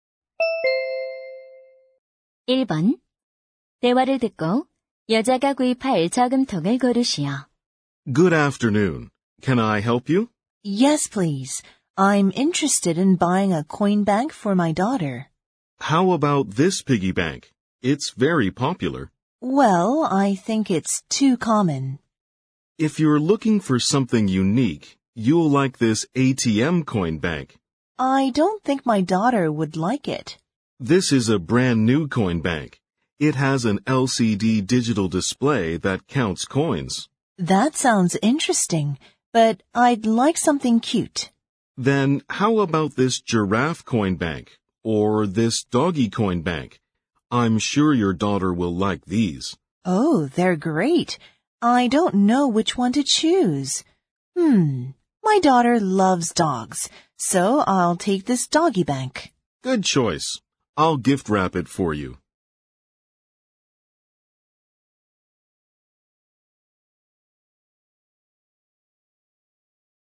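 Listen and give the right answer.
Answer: 강아지 저금통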